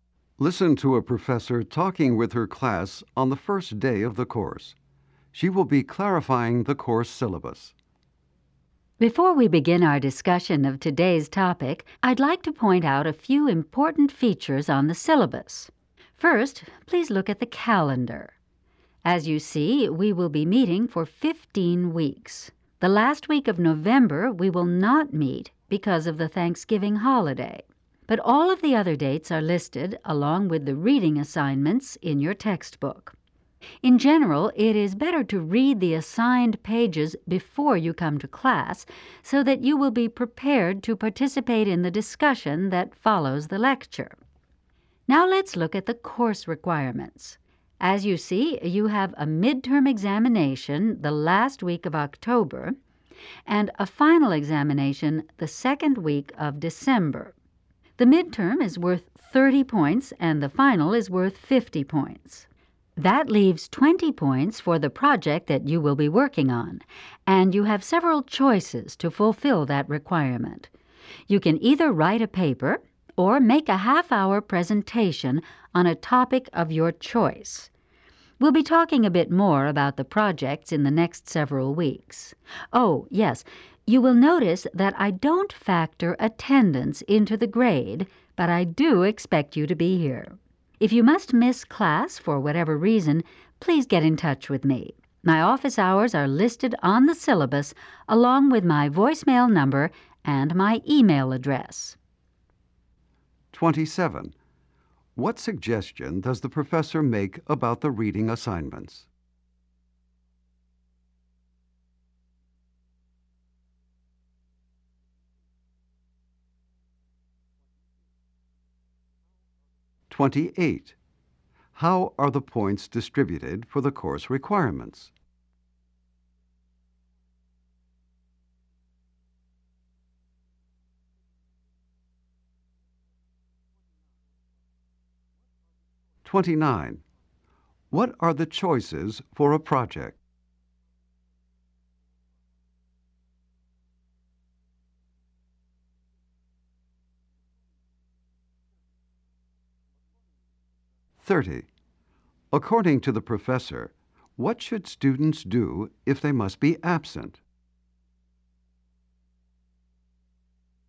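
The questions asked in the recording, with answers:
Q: What suggestion does the professor make about the reading assignments?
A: Read the assigned pages before class

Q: How are the points distributed for the course requirements?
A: Midterm 30 points, final 50 points, project 20 points

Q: What are the choices for a project?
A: A paper or a half-hour presentation

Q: According to the professor, what should students do if they must be absent?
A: Get in touch with the professor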